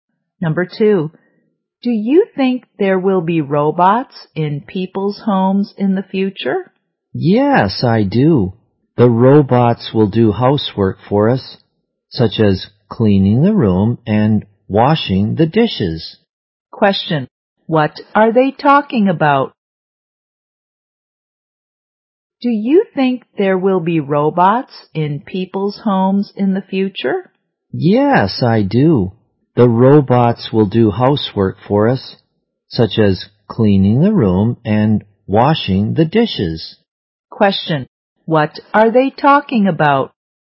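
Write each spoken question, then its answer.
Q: what are they talking about?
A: Robots in people's homes in the future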